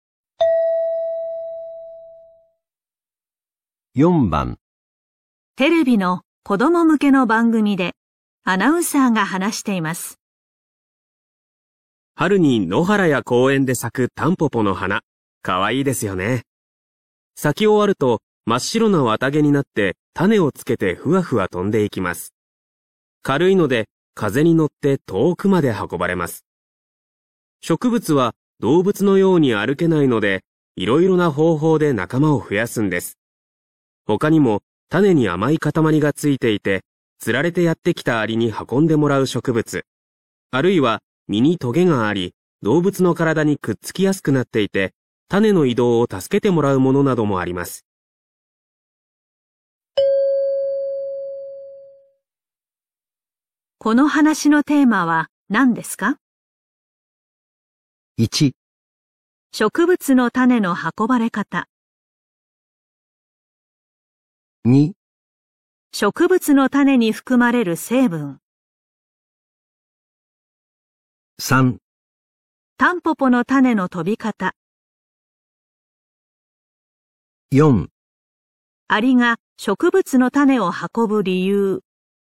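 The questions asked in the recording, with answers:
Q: この話のテーマは何ですか?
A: 1: 植物の種の運ばれ方。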